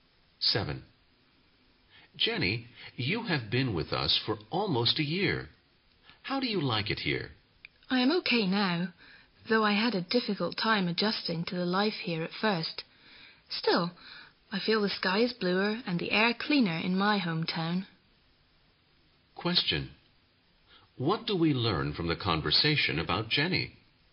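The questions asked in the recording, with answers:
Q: What do we learn from the conversation about Jenny?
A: She has adjusted, but she still prefers her hometown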